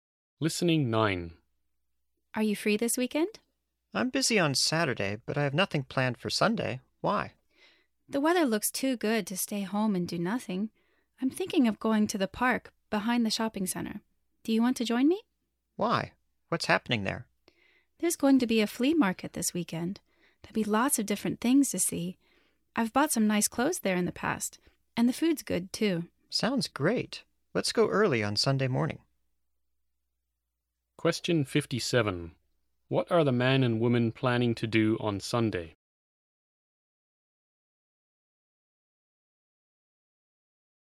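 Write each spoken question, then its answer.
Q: What are the man and woman planning to do on Sunday?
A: Go to the flea market in the park behind the shopping center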